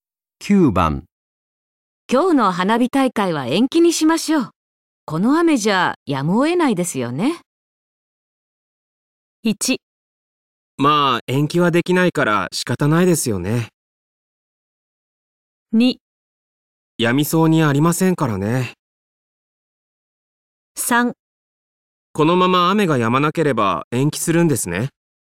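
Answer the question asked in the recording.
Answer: 2: やみそうにありませんからね。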